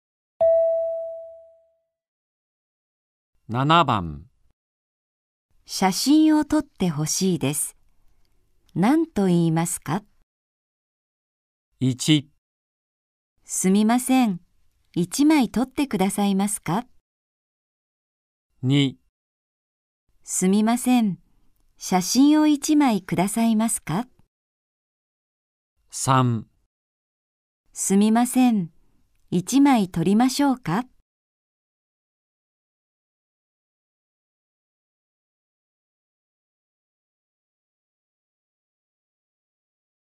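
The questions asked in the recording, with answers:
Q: 写真を撮ってほしいです。何と言いますか?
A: 1: すみません、1枚撮ってくださいますか?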